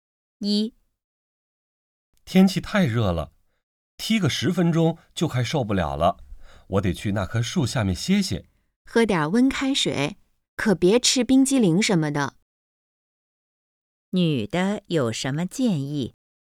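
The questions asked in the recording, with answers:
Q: 女的有什么建议?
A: 喝点温开水,别吃冰激凌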